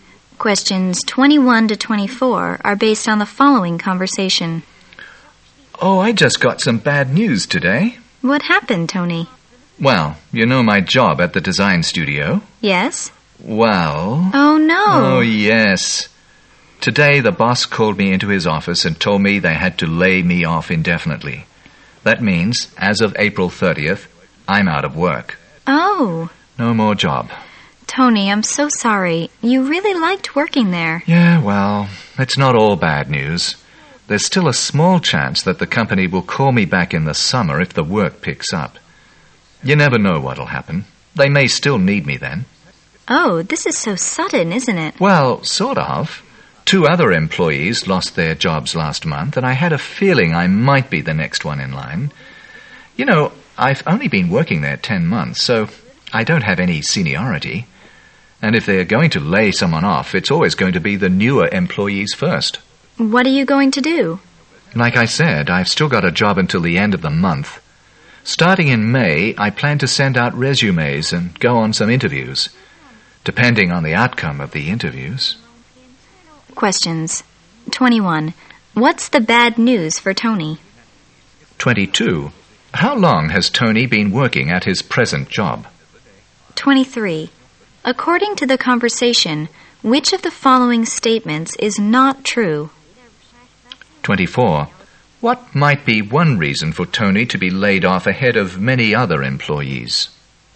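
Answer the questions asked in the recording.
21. He has been laid off
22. 10 months
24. He is a newer employee with no seniority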